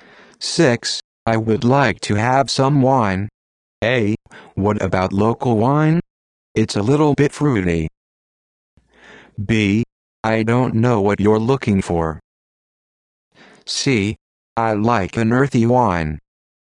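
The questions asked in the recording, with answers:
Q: I would like to have some wine.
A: A: What about local wine? It's a little bit fruity.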